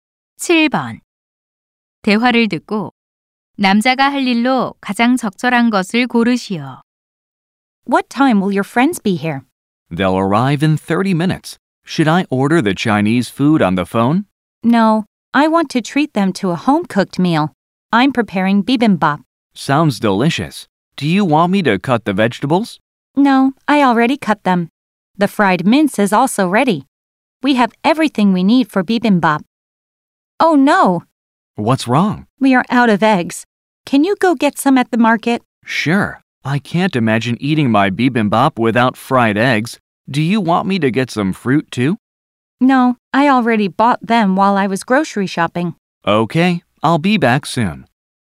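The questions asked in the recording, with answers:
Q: 대화를 듣고 남자가 할 일로 가장 적절한 것을 고르시오.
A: 시장에 가서 달걀 사 오기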